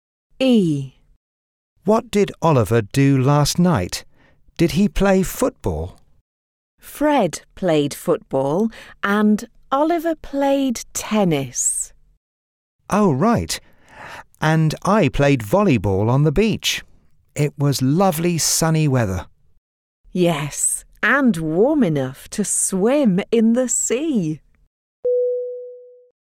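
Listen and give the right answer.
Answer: He played tennis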